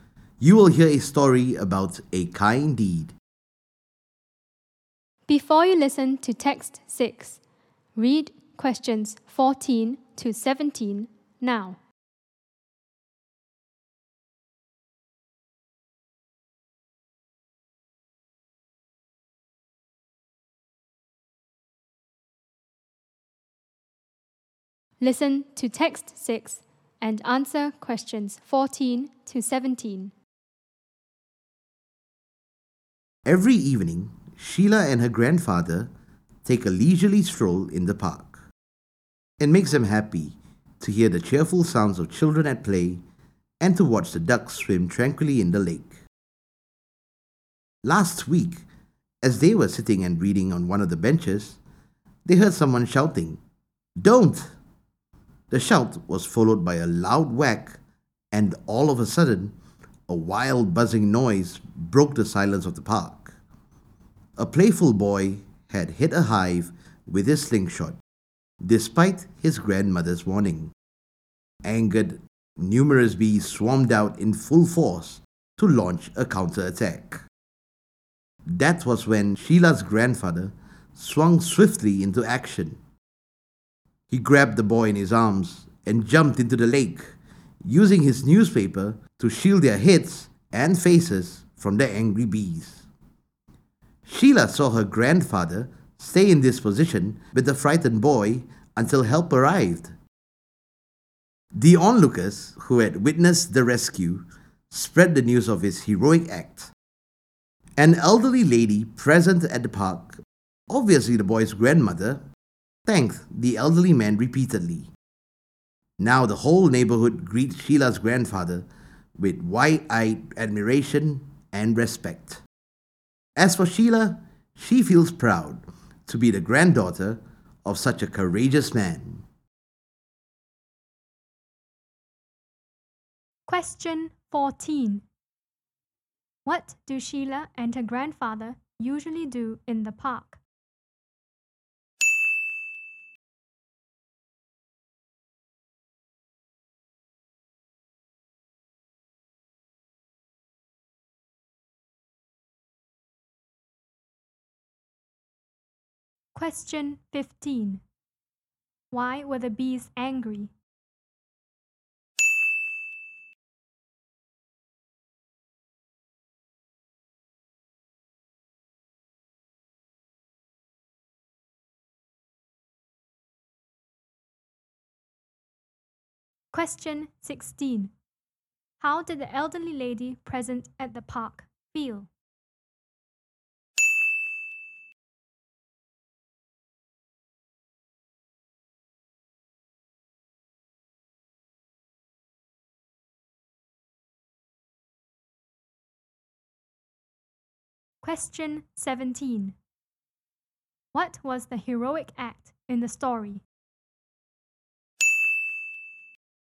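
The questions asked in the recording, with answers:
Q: What do Sheila and her grandfather usually do in the park?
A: They take a leisurely stroll every evening.

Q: Why were the bees angry?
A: A boy hit their hive with his slingshot.

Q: How did the elderly lady present at the park feel?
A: Grateful

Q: What was the heroic act in the story?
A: The grandfather grabbed the boy and jumped into the lake, shielding them from the bees with his newspaper.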